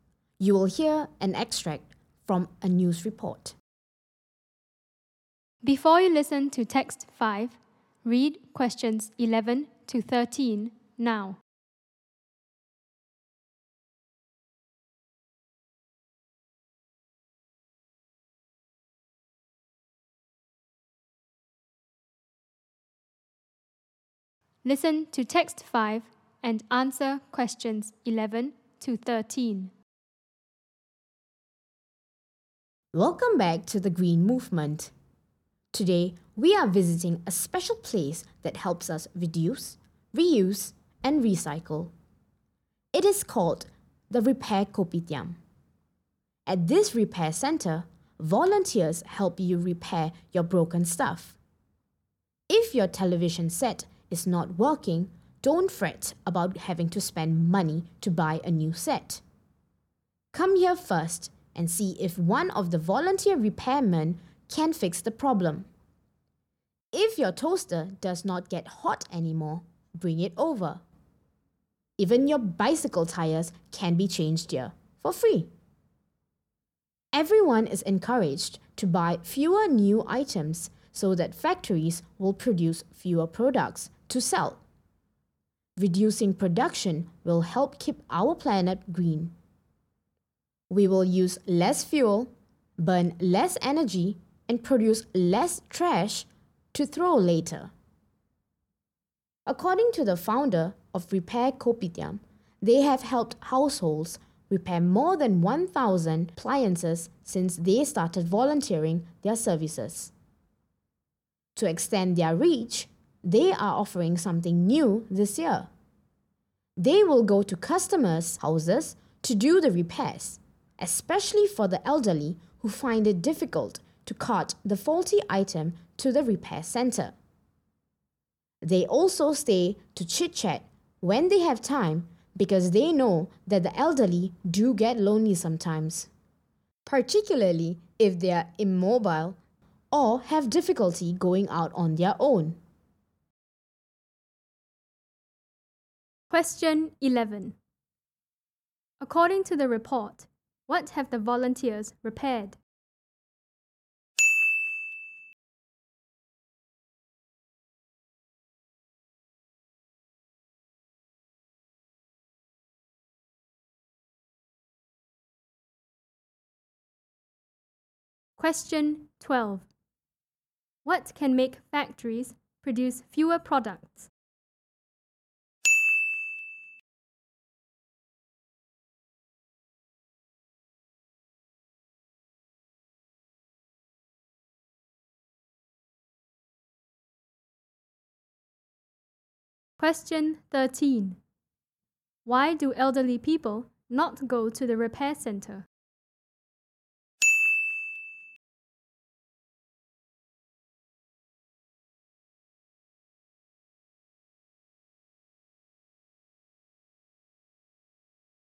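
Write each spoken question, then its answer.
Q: What can make factories produce fewer products?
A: People buying fewer new items

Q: Why do elderly people not go to the repair center?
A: They find it difficult to carry the faulty item to the repair center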